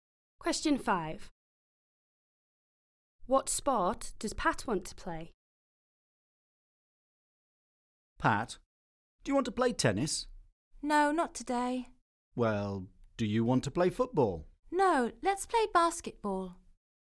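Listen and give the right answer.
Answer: Basketball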